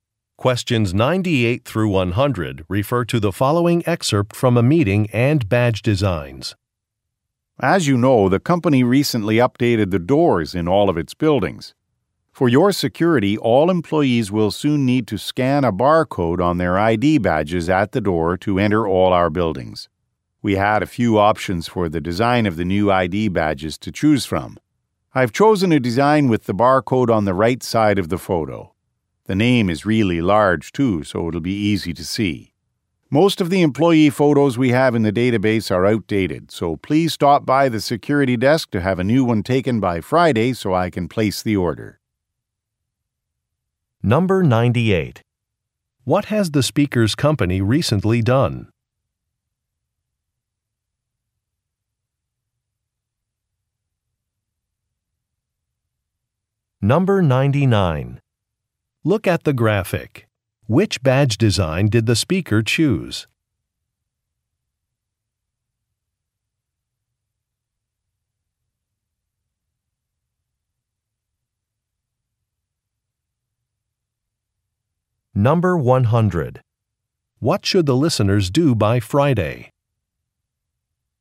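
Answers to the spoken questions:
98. Updated the doors in its buildings
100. Have a new ID photo taken at the security desk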